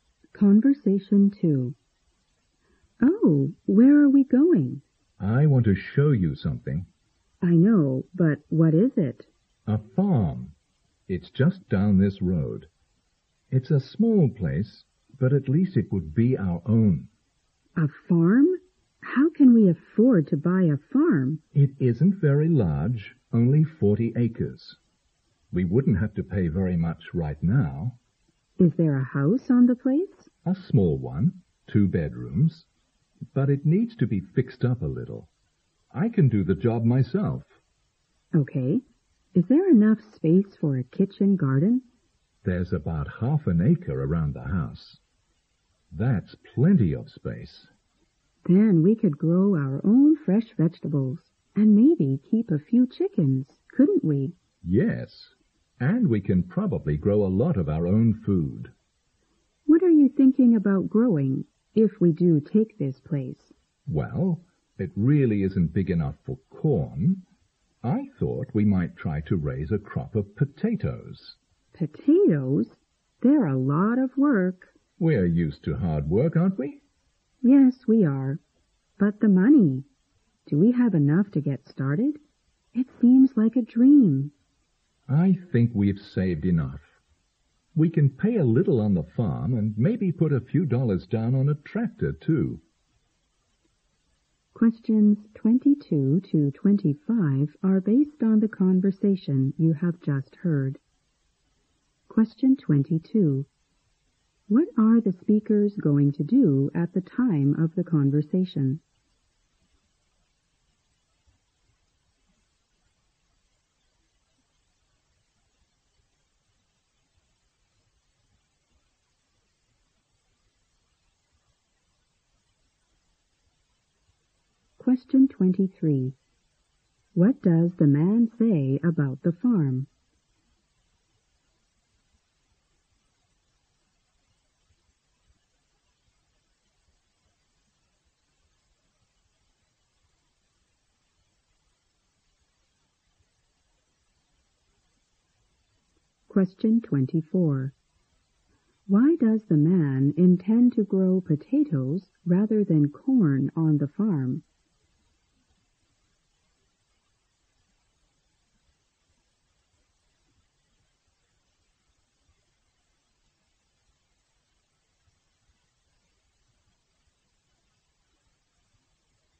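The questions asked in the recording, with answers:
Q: What are the speakers going to do at the time of the conversation?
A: Go and look at a farm

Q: Why does the man intend to grow potatoes rather than corn on the farm?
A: The farm isn't big enough for corn.

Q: What is the woman's greatest concern about the man's plan?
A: Whether they have enough money to get started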